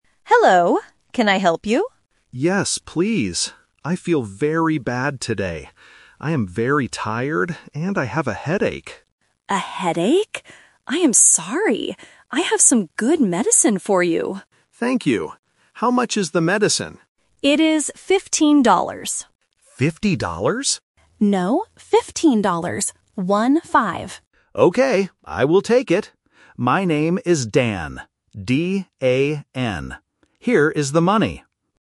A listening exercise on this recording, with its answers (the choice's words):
Listen to the conversation and circle the correct answer for each question.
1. How does the customer feel today?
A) Tired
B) Angry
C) Happy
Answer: Tired

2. How much does the medicine cost?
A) $5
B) $15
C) $50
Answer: $15

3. What is the customer's name?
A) Don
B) Stan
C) Dan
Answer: Dan

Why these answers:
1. The correct answer is (A). The customer explicitly says, "I am very tired, and I have a headache." Options (B) "Angry" and (C) "Happy" are not mentioned in the dialogue.
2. The correct answer is (B). The pharmacist says the price is "15 dollars" and repeats "One-five" to clarify. Option (C) "$50" is the trap; the customer mishears it as 50, but the pharmacist corrects him. Option (A) "$5" is a trap using a partial number.
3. The correct answer is (C). The customer spells his name very clearly: "D-A-N." Option (A) "Don" is a vowel sound trap, and Option (B) "Stan" is a consonant sound trap.

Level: A1